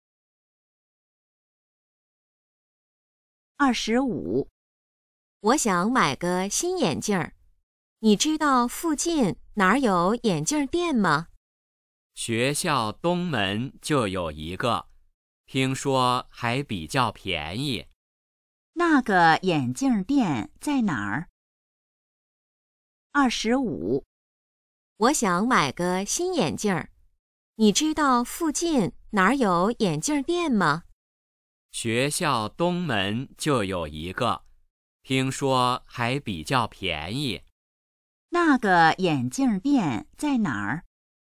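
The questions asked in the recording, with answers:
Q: 那个眼镜店在哪儿?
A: 学校东门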